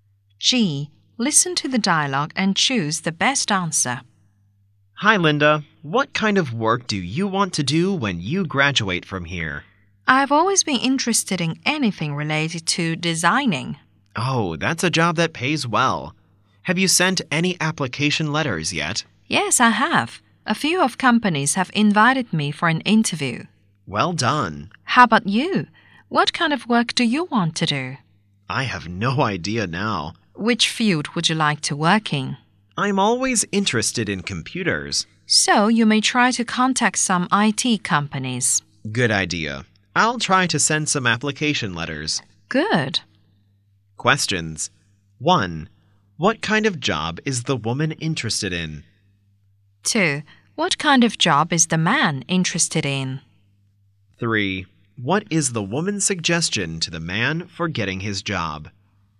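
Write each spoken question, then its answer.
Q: What kind of job is the woman interested in?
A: Designing

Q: What kind of job is the man interested in?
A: Computers (IT)

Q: What is the woman's suggestion to the man for getting his job?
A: Contact some IT companies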